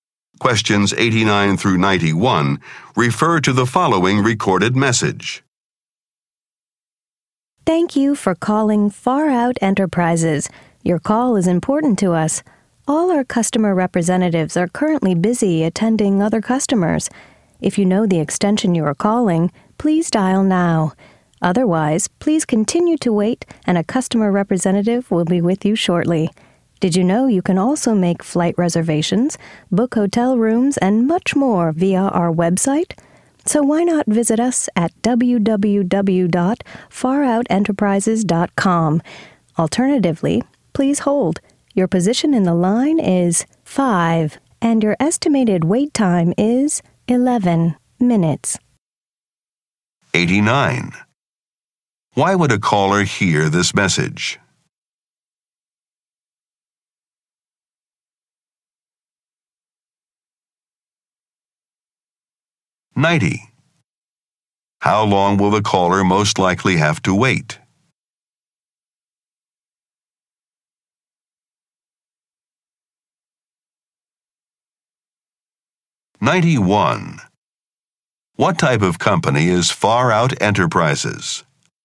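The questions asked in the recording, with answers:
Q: Why would a caller hear this message?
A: All representatives are busy

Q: How long will the caller most likely have to wait?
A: 11 minutes

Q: What type of company is Far Out Enterprises?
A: A travel company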